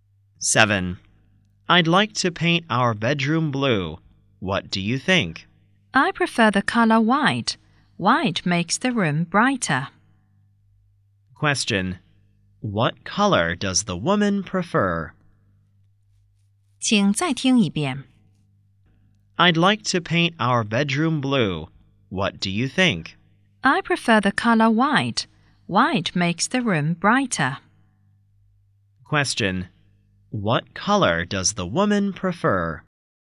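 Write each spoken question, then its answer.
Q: What color does the woman prefer?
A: White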